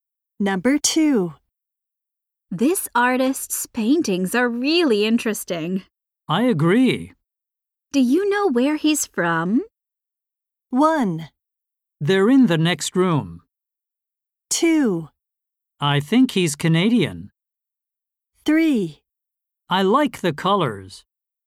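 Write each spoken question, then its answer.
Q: Do you know where he's from?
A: 2: I think he's Canadian.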